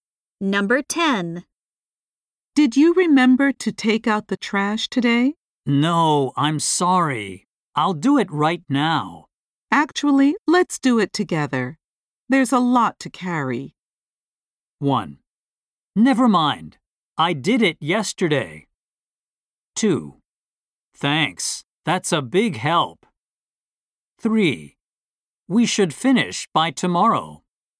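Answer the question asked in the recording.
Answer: 2: Thanks. That's a big help.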